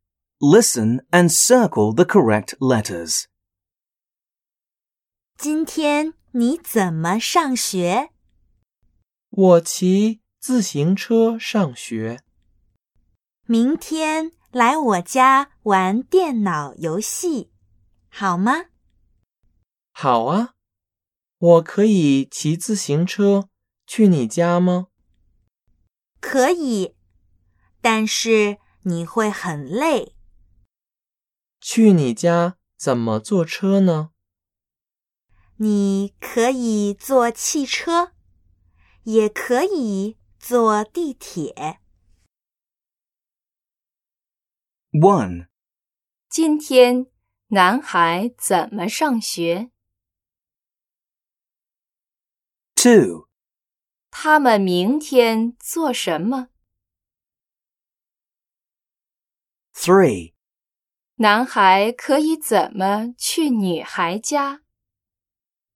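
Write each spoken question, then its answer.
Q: 今天男孩怎么上学?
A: 骑自行车

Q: 他们明天做什么?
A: 玩电脑游戏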